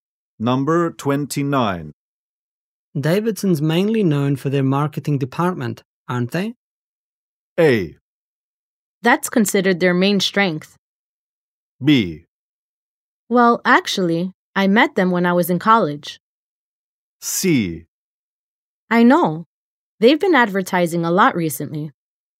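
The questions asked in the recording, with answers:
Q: Davidson's mainly known for their marketing department, aren't they?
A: A: That's considered their main strength.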